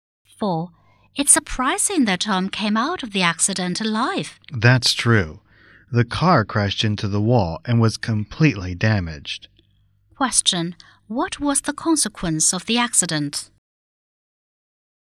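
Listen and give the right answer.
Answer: Tom survived but the car was completely damaged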